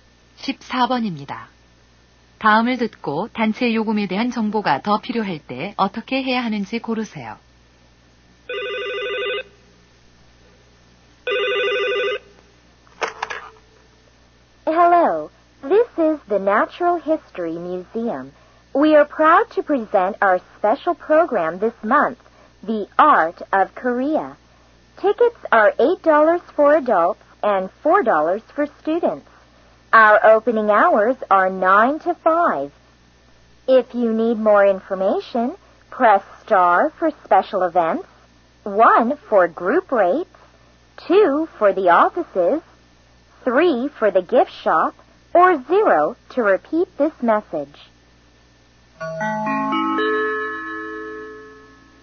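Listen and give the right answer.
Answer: 1번을 누른다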